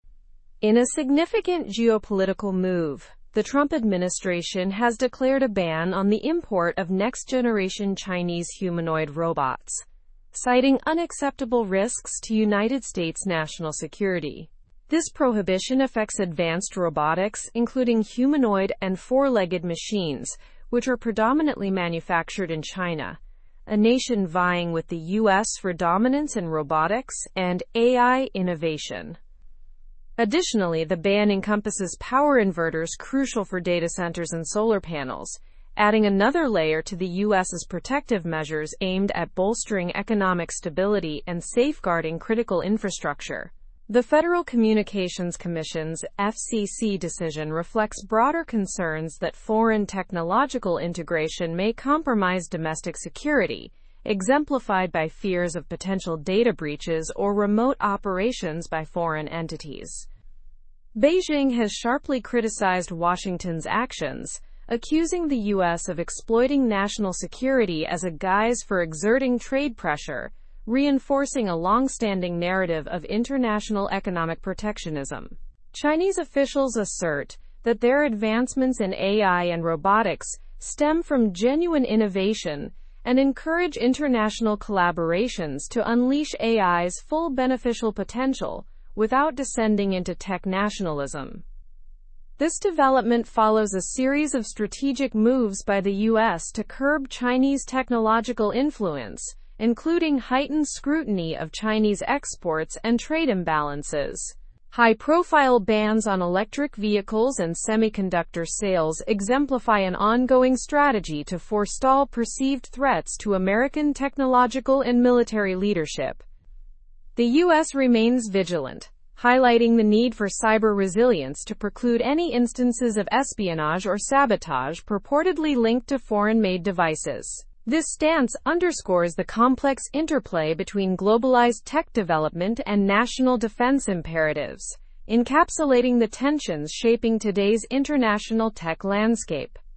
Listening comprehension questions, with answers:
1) What decision did the Trump administration make regarding Chinese robotics?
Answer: The Trump administration decided to ban the import of next-generation Chinese humanoid robots.

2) What additional items are included in the US ban, apart from robots?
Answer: The ban also includes power inverters crucial for data centers and solar panels.

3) Why are these bans being imposed by the US, according to the article?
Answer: The bans are imposed due to concerns about national security risks posed by foreign technological integrations.

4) How has Beijing responded to the US's decision?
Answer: Beijing has sharply criticized the US's actions, calling it an exploitation of national security for trade pressure.

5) What long-standing narrative does China accuse the US of reinforcing?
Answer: China accuses the US of reinforcing a narrative of international economic protectionism.

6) Which examples are given of past US actions to curb Chinese influence?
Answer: Examples include heightened scrutiny of Chinese exports and bans on electric vehicles and semiconductors.

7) What stance does the US maintain regarding technological developments?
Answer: The US maintains a stance of vigilance to ensure national security and mitigate foreign technological threats.

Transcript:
In a significant geopolitical move, the Trump administration has declared a ban on the import of next-generation Chinese humanoid robots, citing unacceptable risks to United States national security. This prohibition affects advanced robotics, including humanoid and four-legged machines, which are predominantly manufactured in China, a nation vying with the US for dominance in robotics and AI innovation.
Additionally, the ban encompasses power inverters crucial for data centers and solar panels, adding another layer to the US's protective measures aimed at bolstering economic stability and safeguarding critical infrastructure. The Federal Communications Commission's (FCC) decision reflects broader concerns that foreign technological integration may compromise domestic security, exemplified by fears of potential data breaches or remote operations by foreign entities.
Beijing has sharply criticized Washington's actions, accusing the US of exploiting national security as a guise for exerting trade pressure, reinforcing a long-standing narrative of international economic protectionism. Chinese officials assert that their advancements in AI and robotics stem from genuine innovation and encourage international collaborations to unleash AI's full beneficial potential without descending into tech-nationalism.
This development follows a series of strategic moves by the US to curb Chinese technological influence, including heightened scrutiny of Chinese exports and trade imbalances. High-profile bans on electric vehicles and semiconductor sales exemplify an ongoing strategy to forestall perceived threats to American technological and military leadership.
The US remains vigilant, highlighting the need for cyber resilience to preclude any instances of espionage or sabotage purportedly linked to foreign-made devices. This stance underscores the complex interplay between globalized tech development and national defense imperatives, encapsulating the tensions shaping today's international tech landscape.

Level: Level 4